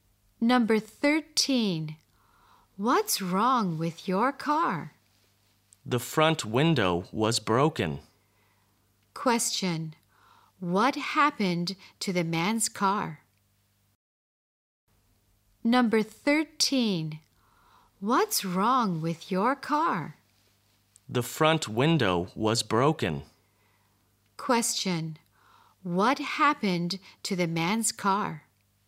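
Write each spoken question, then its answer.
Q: What happened to the man's car?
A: The front window was broken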